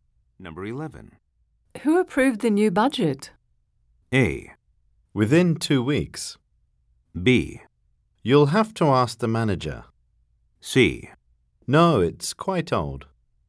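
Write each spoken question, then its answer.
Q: Who approved the new budget?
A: B: You'll have to ask the manager.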